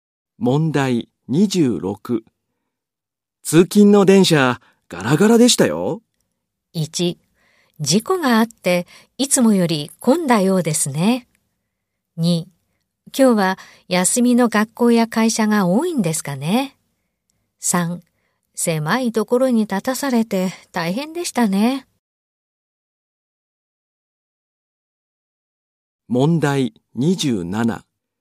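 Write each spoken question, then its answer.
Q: 通勤の電車、ガラガラでしたよ。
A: 2: 今日は休みの学校や会社が多いんですかね。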